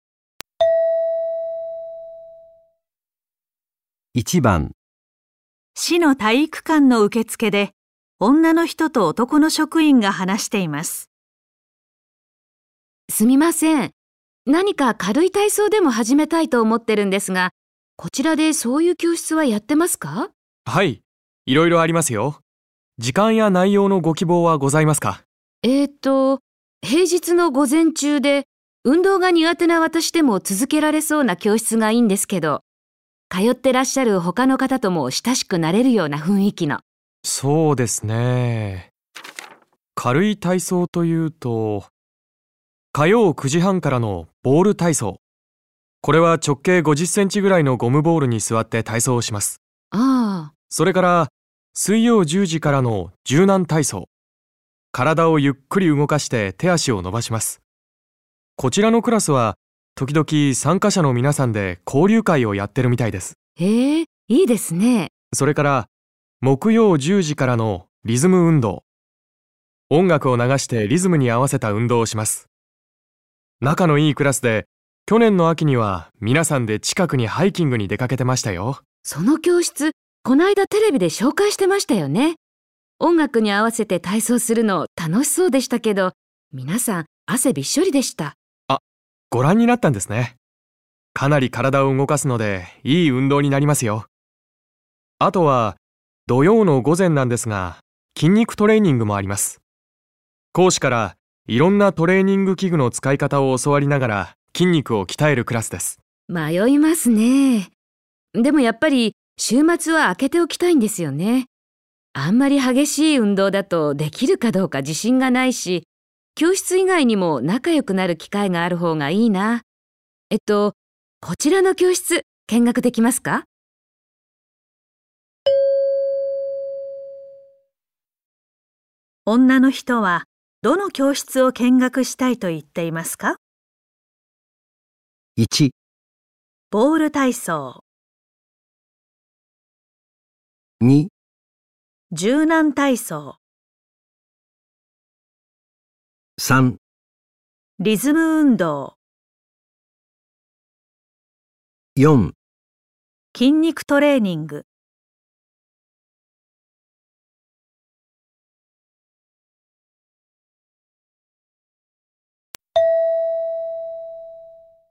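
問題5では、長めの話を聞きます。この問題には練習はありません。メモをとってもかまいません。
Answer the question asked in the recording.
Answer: 柔軟体操

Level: N2 Listening · Test 1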